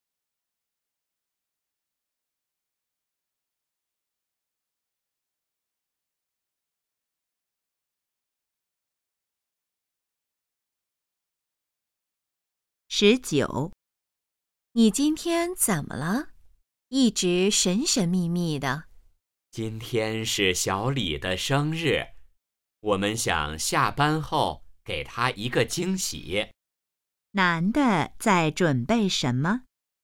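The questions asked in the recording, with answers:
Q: 男的在准备什么?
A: 给小李的生日惊喜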